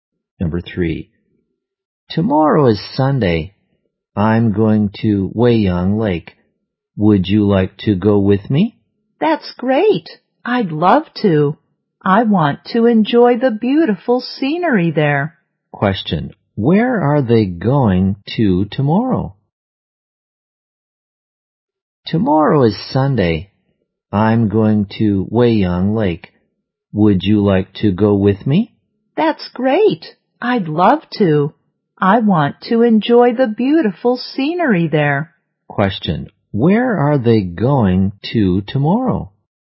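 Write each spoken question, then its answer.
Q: Where are they going to tomorrow?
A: Weiyang Lake.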